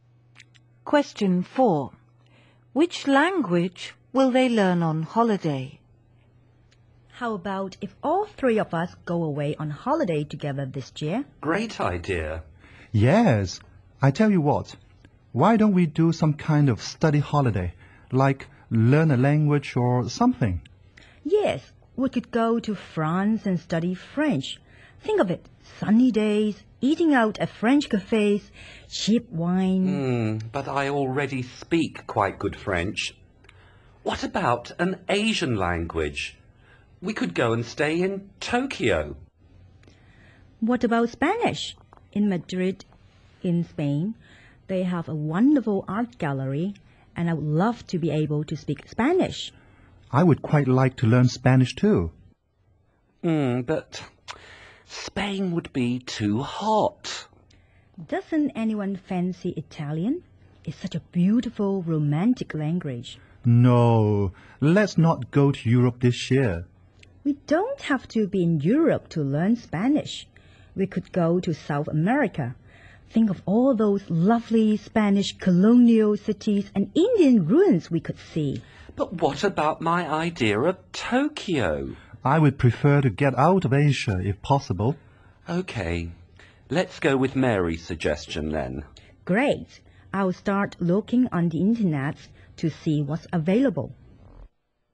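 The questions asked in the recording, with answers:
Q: Which language will they learn on holiday?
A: Spanish (in South America)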